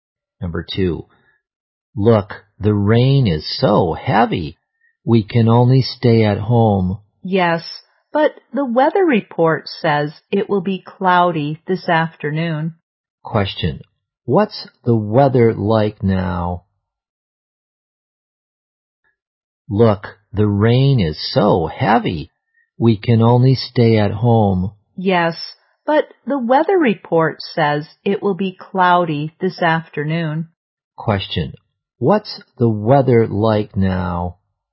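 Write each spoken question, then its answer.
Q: what's the weather like now?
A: Rainy (heavy rain).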